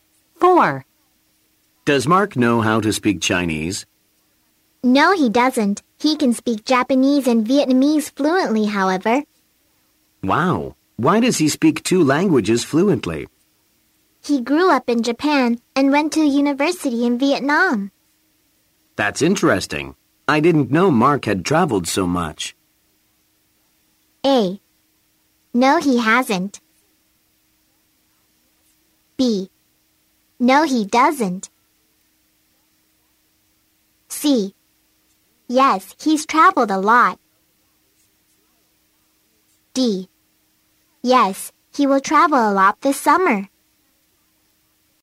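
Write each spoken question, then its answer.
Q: That's interesting. I didn't know Mark had traveled so much.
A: C: Yes, he's traveled a lot.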